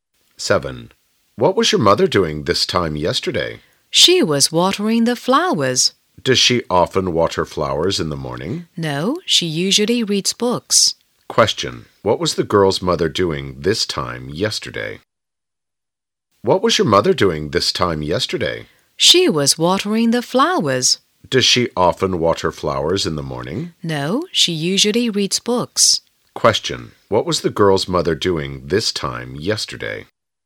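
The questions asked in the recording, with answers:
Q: What was the girl's mother doing this time yesterday?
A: She was watering the flowers.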